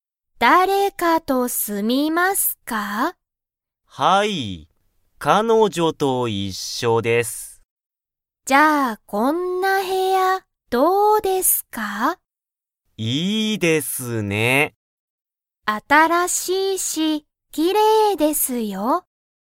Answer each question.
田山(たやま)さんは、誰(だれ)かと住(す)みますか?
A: はい

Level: Level 1